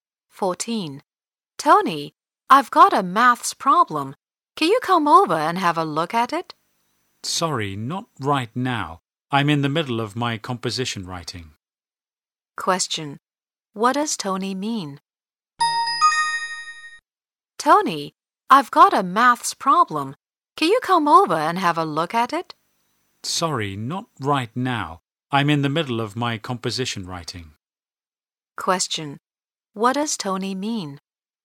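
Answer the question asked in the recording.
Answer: He can't help right now because he is busy writing his composition.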